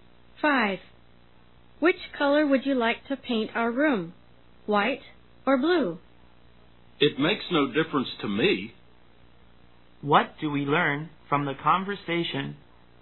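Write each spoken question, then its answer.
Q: What do we learn from the conversation?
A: The second speaker doesn't mind whether the room is white or blue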